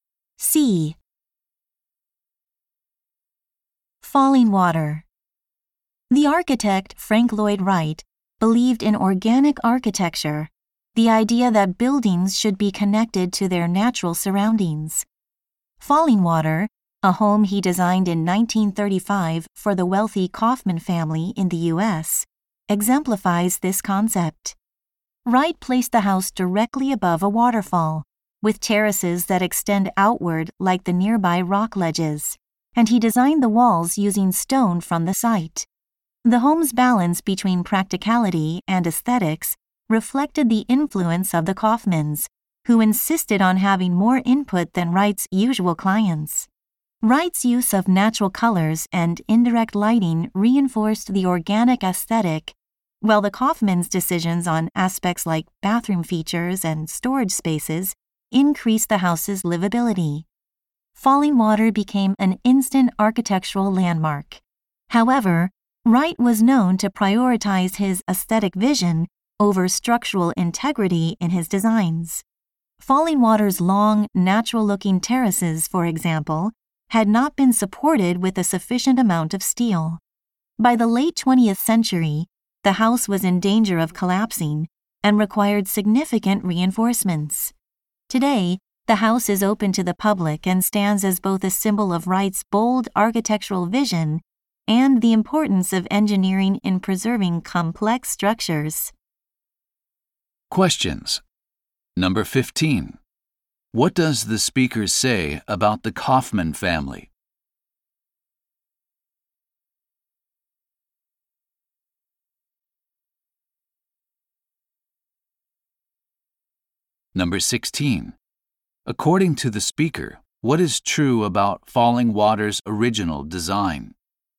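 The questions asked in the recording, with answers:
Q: What does the speaker say about the Kaufman family?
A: They insisted on more input, making the house more livable

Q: According to the speaker, what is true about Falling Water's original design?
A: The terraces lacked enough steel support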